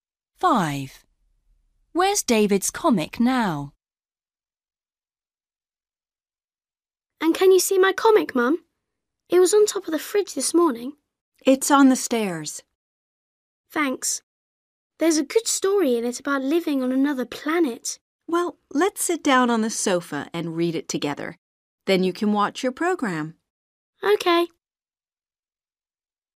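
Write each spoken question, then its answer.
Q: Where's David's comic now?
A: on the stairs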